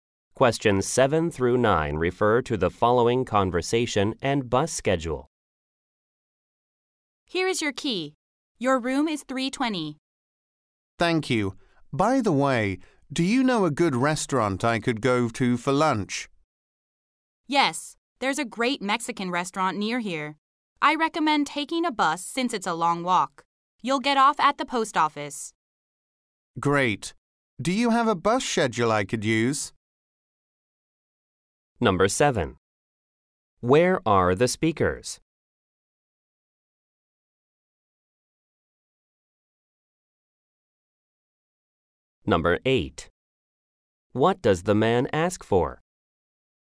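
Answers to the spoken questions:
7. At a hotel
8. A bus schedule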